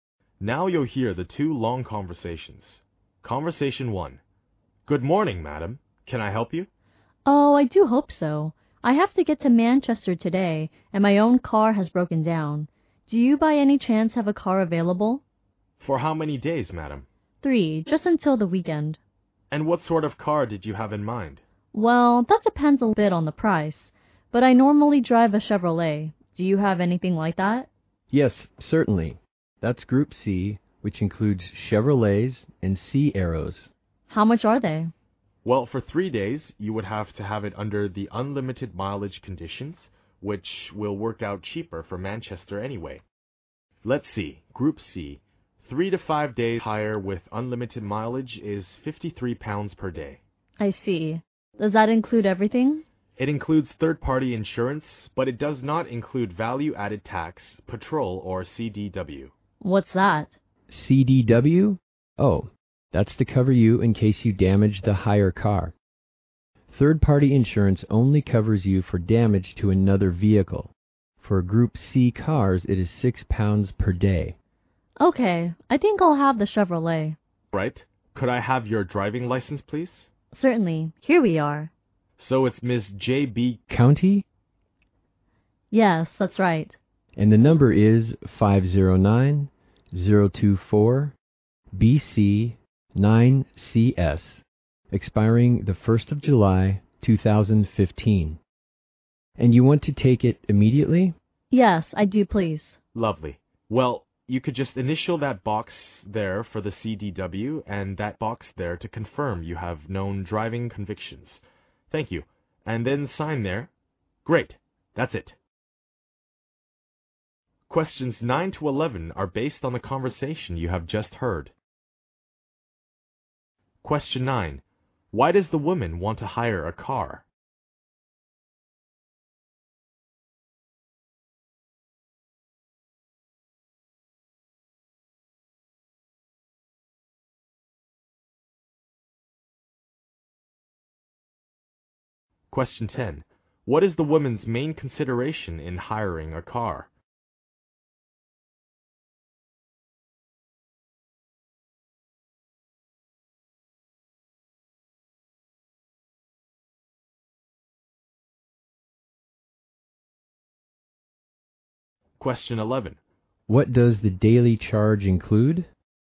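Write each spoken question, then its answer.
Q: Why does the woman want to hire a car?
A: Her own car has broken down and she must get to Manchester.

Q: What is the woman's main consideration in hiring a car?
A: The price.

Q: What does the daily charge include?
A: Third-party insurance.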